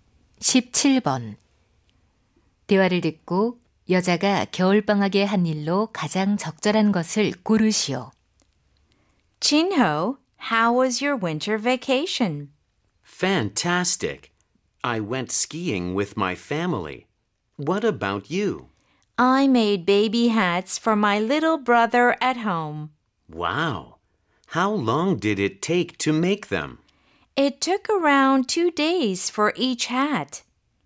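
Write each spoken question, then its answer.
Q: 대화를 듣고 여자가 겨울방학에 한 일로 가장 적절한 것을 고르시오.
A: 남동생을 위해 아기 모자 만들기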